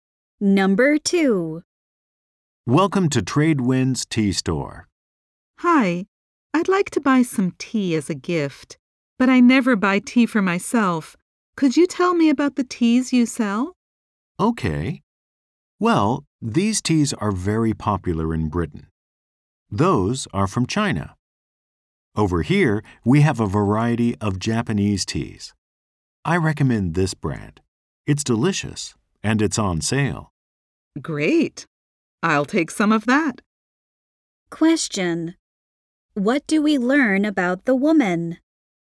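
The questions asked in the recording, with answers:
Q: What do we learn about the woman?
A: She never buys tea for herself; she is buying tea as a gift.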